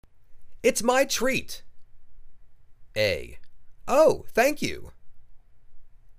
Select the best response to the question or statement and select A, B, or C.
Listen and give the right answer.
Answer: Oh, thank you!